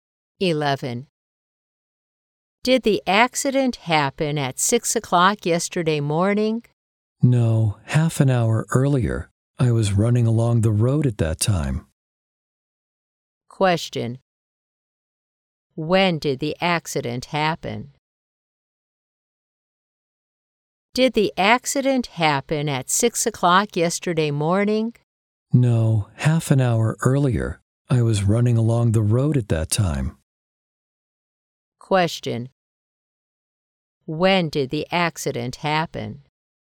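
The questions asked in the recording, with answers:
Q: When did the accident happen?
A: At 5:30 yesterday morning.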